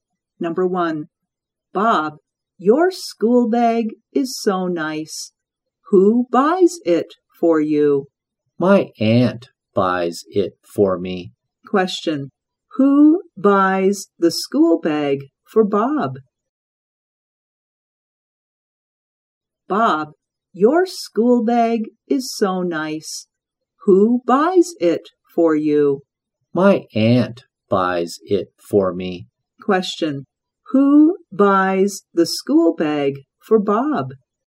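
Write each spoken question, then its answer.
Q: Question, who buys the school bag for Bob?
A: His aunt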